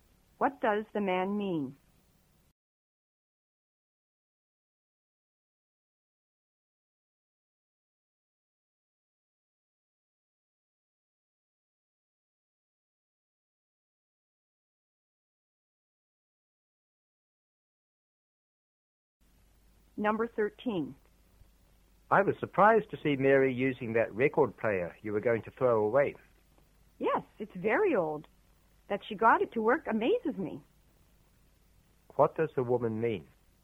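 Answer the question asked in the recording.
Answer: She's amazed Mary got the old record player to work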